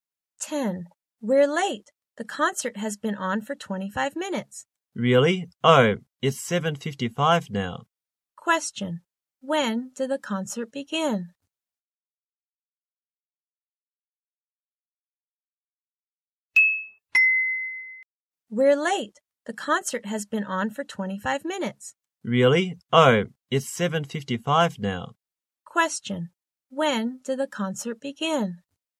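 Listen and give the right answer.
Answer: At 7:30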